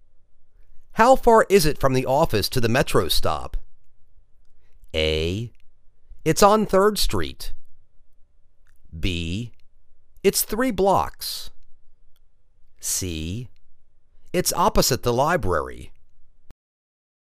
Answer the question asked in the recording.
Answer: It's three blocks